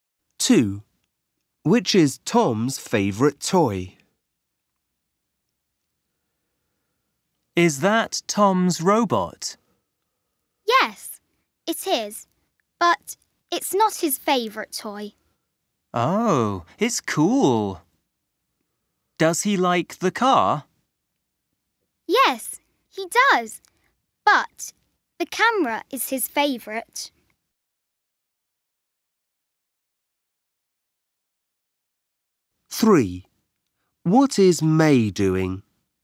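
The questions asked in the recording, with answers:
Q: Which is Tom's favourite toy?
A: The camera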